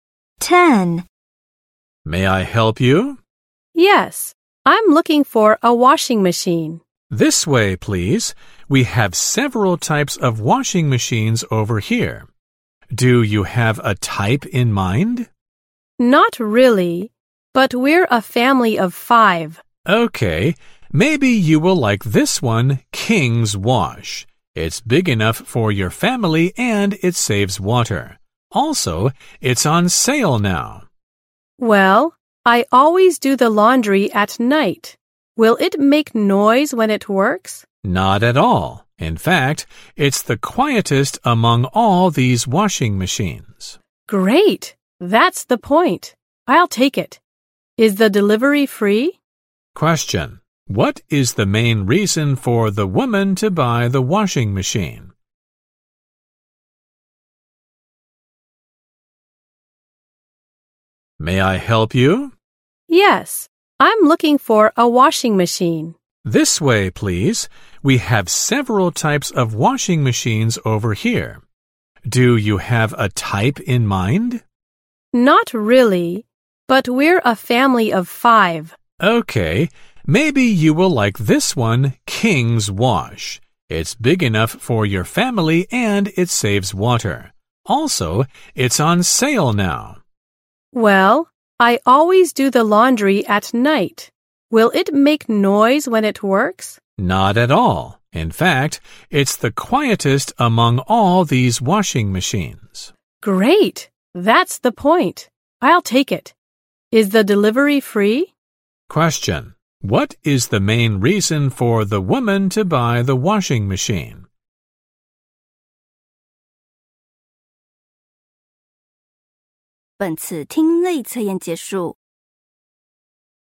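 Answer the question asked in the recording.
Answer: It is very quiet.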